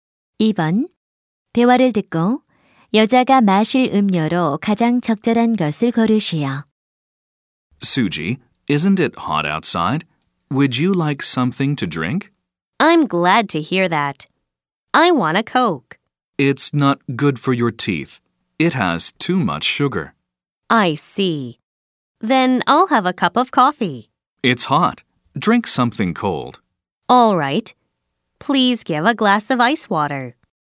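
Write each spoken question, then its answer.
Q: 대화를 듣고 여자가 마실 음료로 가장 적절한 것을 고르시오.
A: 얼음물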